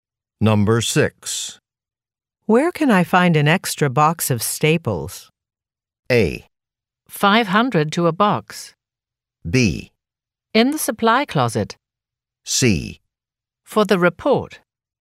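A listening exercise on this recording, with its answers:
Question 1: Where can I find an extra box of staples?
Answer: In the supply closet.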